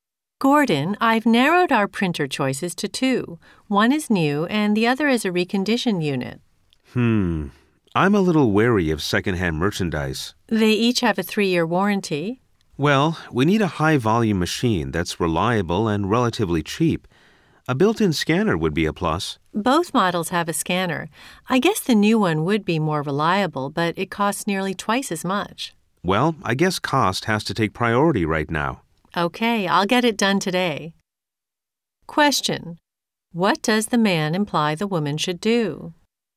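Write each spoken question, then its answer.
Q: Question: What does the man imply the woman should do?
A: Buy the reconditioned (secondhand) printer because it is cheaper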